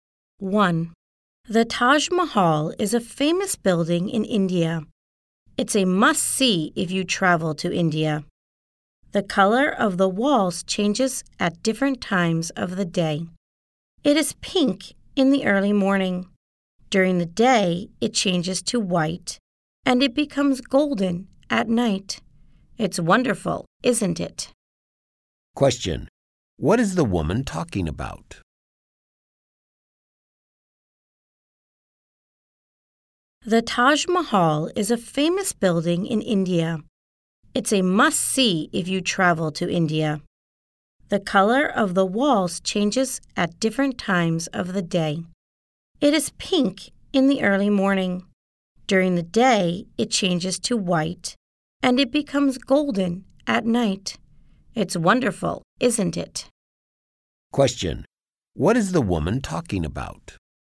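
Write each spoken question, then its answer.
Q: What is the woman talking about?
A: The Taj Mahal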